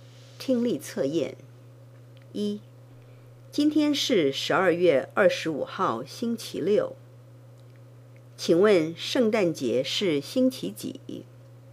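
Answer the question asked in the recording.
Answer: 星期六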